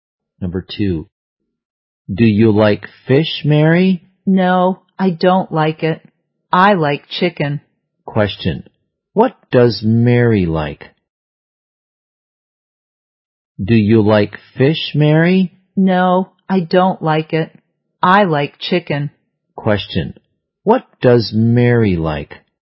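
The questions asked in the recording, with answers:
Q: Question, what does Mary like?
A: Chicken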